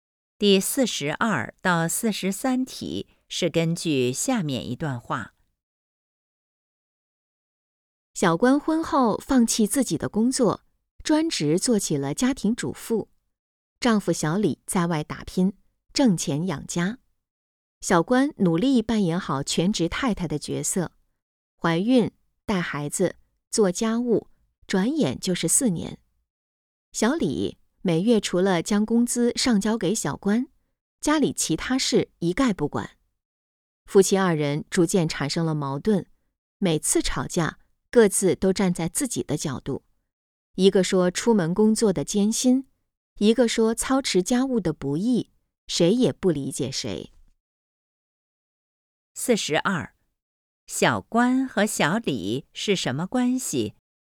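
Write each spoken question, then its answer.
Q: 小关和小李是什么关系?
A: 夫妻

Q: 他们吵架的内容主要是什么?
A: 工作艰辛与家务不易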